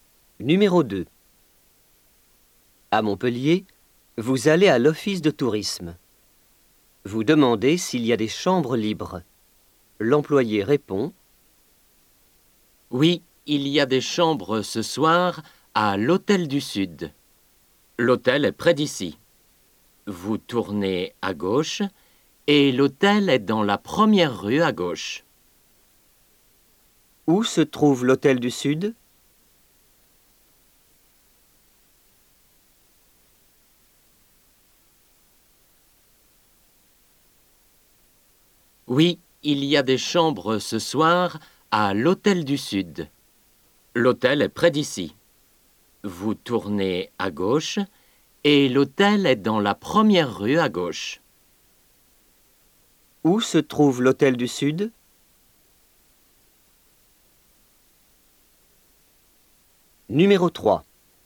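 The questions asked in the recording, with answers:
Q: Où se trouve l'hôtel du Sud?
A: Tournez à gauche, puis dans la première rue à gauche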